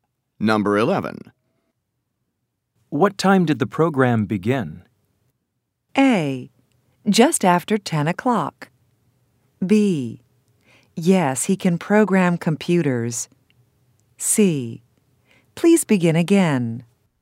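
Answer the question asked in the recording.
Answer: A: Just after 10 o'clock.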